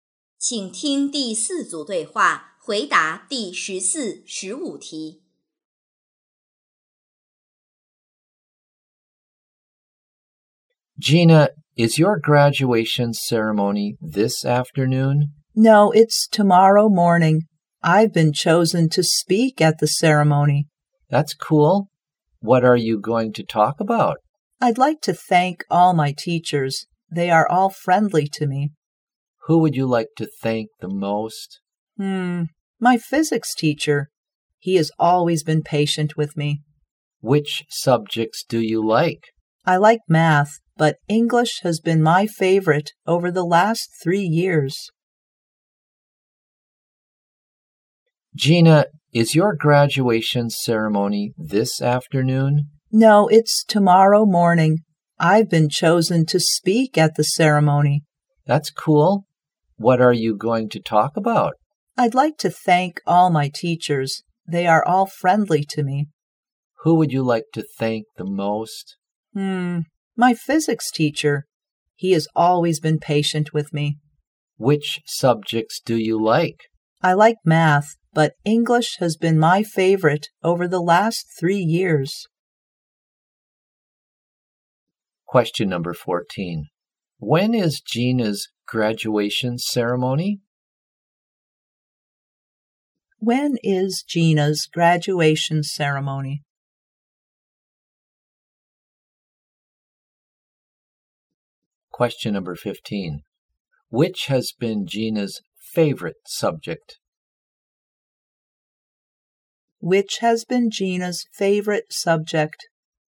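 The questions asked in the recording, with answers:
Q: When is Gina's graduation ceremony?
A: Tomorrow morning

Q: Which has been Gina's favorite subject?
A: English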